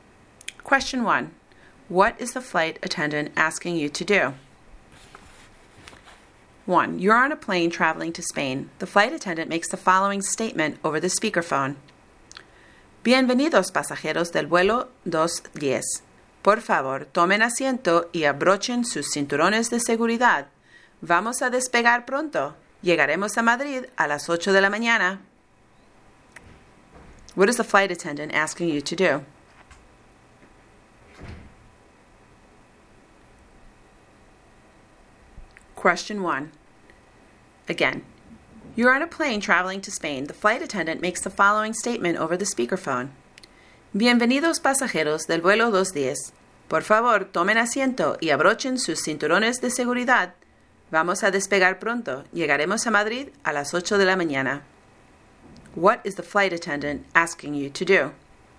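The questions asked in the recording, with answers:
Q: What is the flight attendant asking you to do?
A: To sit down and fasten your seat belt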